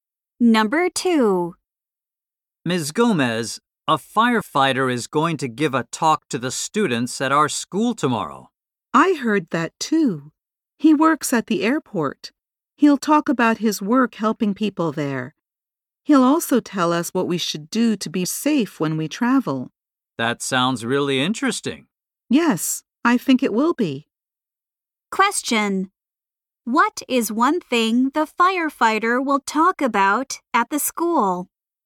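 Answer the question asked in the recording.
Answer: His work helping people at the airport / how to be safe when traveling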